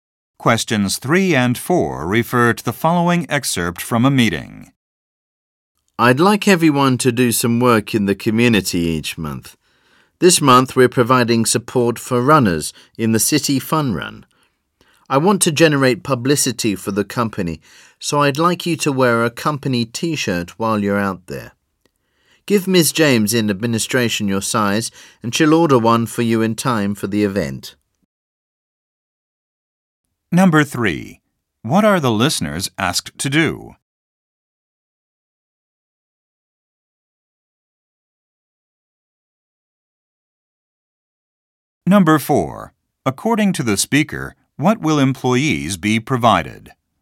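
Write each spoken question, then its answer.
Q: According to the speaker, what will employees be provided?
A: A company T-shirt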